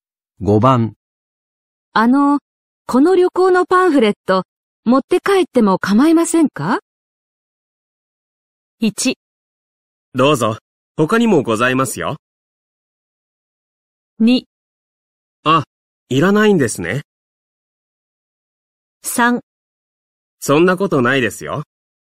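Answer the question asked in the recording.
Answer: 1: どうぞ。他にもございますよ。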